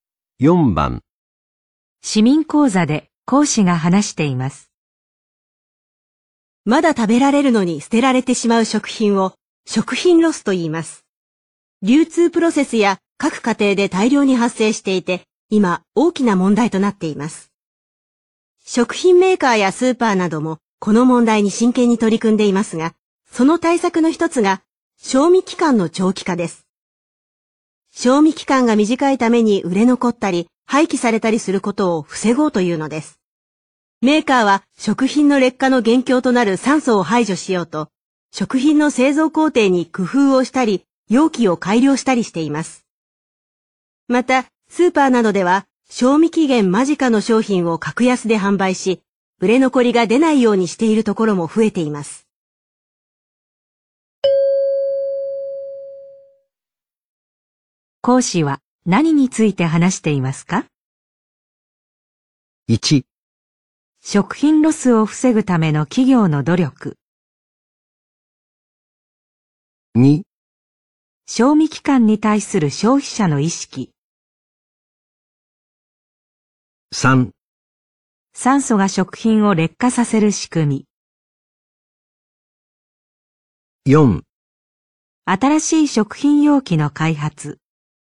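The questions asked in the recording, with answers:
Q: 講師は何について話していますか?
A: 1: 食品ロスを防ぐための企業の努力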